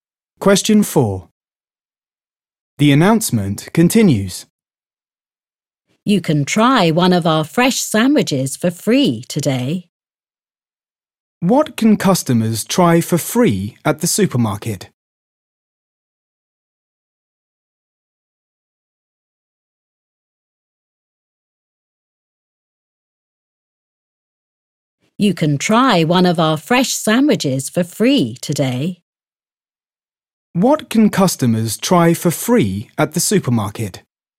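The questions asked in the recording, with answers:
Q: What can customers try for free at the supermarket?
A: a fresh sandwich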